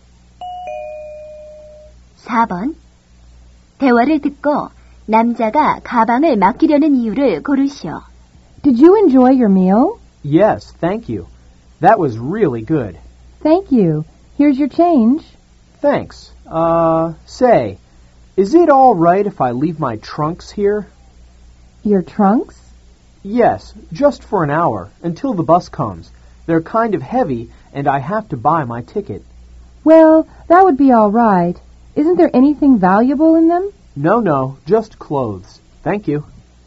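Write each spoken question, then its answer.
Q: 대화를 듣고 남자가 가방을 맡기려는 이유를 고르시오.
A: 가방이 무겁고 버스표를 사야 해서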